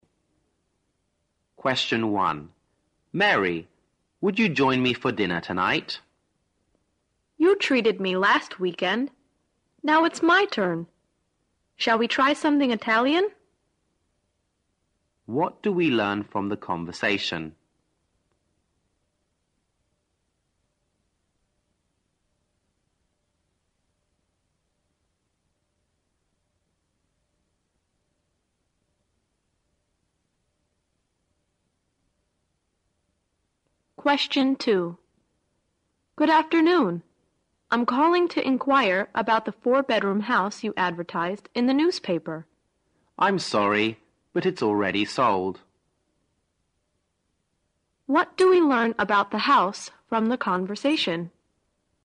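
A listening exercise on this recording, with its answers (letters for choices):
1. What do we learn from the conversation?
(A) They are both anxious to try Italian food.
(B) They are likely to have dinner together.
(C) The man will treat the woman to dinner tonight.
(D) The woman refused to have dinner with the man.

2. What do we learn about the house from the conversation?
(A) It's only for rent, not for sale.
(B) It's not as good as advertised.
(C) It's being redecorated.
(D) It's no longer available.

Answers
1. B
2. D

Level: 大学英语四级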